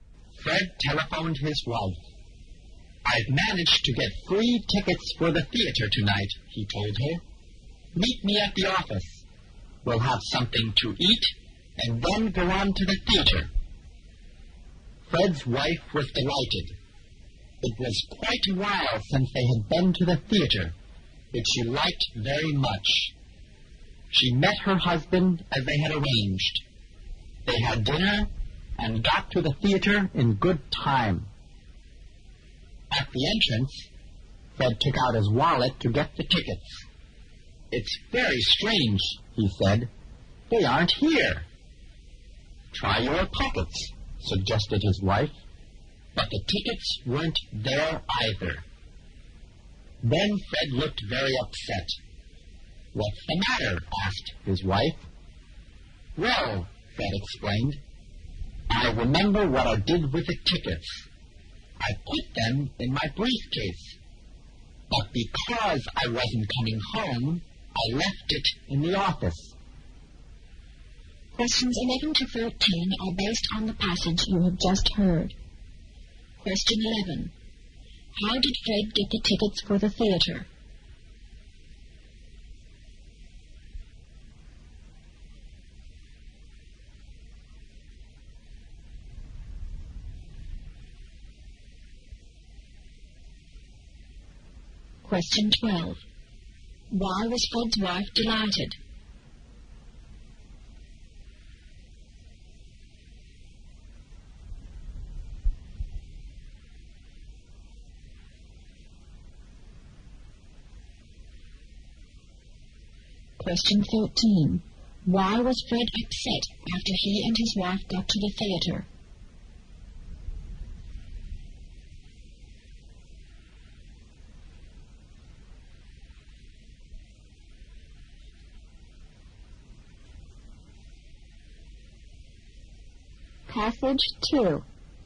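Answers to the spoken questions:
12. They hadn't been to the theater for a long time, and she liked it very much
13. He had left the tickets in his briefcase at the office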